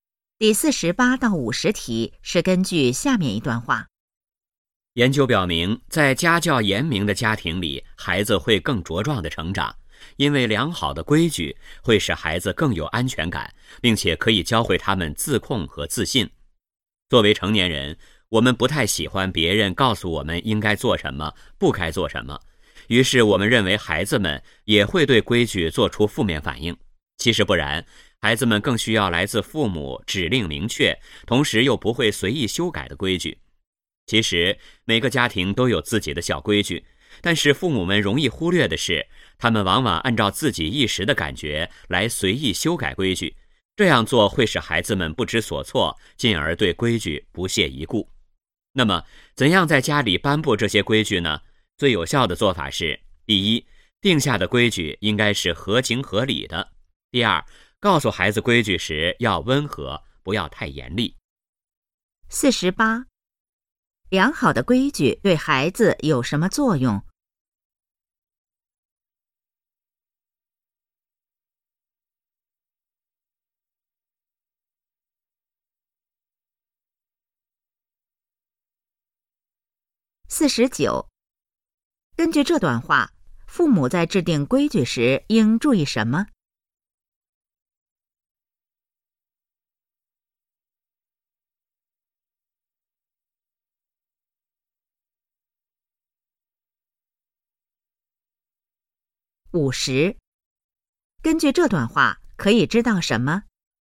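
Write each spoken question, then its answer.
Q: 良好的规矩对孩子有什么作用?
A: 使孩子更有安全感,教会他们自控和自信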